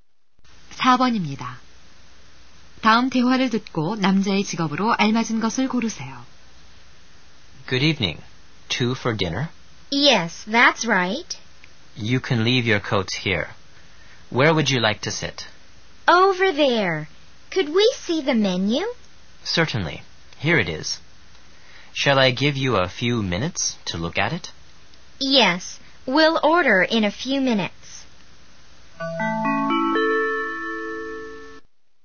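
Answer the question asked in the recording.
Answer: 식당 종업원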